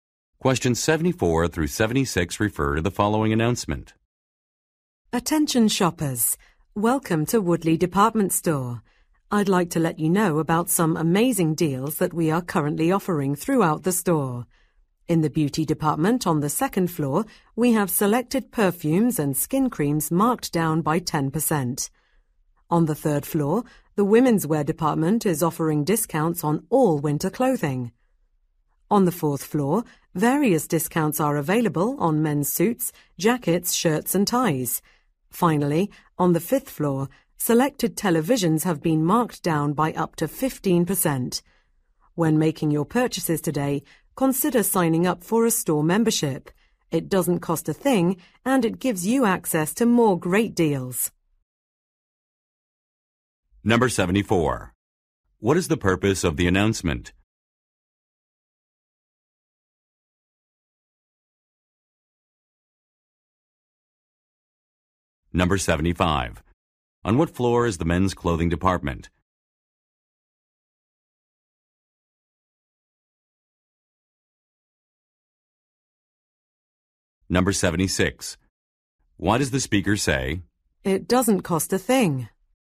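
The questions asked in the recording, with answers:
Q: What is the purpose of the announcement?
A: To inform shoppers about store discounts

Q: On what floor is the men's clothing department?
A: The fourth floor

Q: Why does the speaker say,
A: Store membership is free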